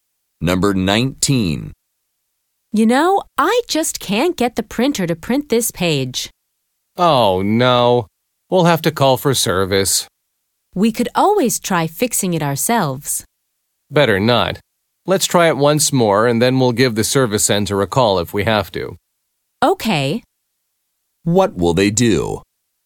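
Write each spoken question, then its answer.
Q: What will they do?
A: Try printing once more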